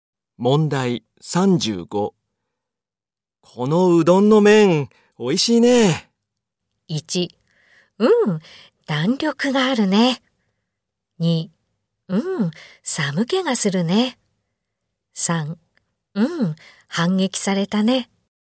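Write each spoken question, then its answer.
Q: このうどんの麺、おいしいね。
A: 1: うん、弾力があるね。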